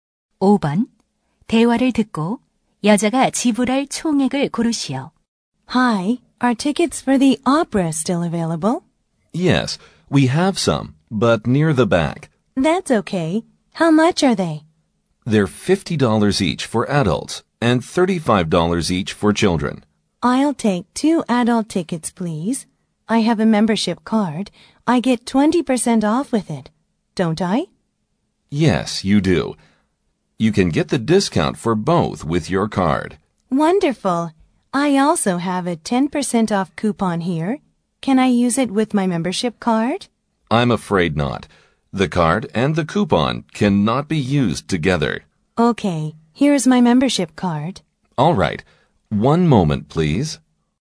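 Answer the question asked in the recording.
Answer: 80달러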